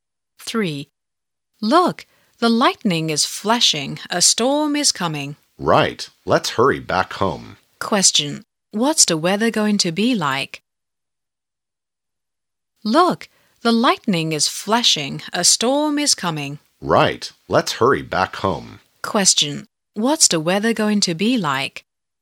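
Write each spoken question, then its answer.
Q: What's the weather going to be like?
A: Stormy; a storm is coming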